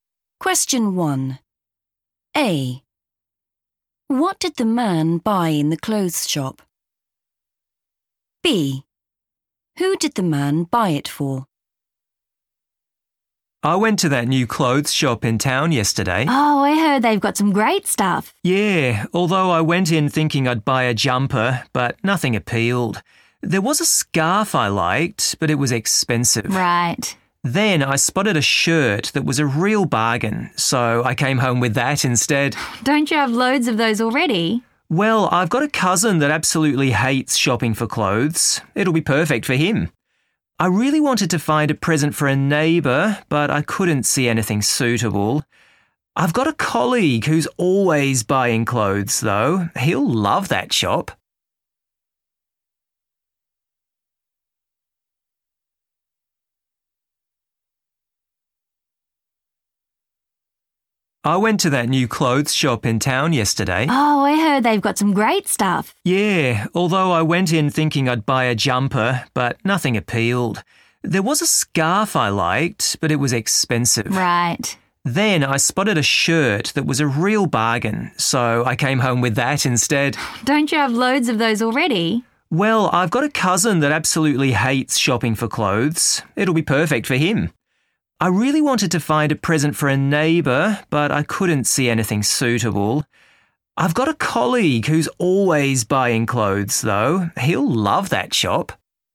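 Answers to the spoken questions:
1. a shirt
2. his cousin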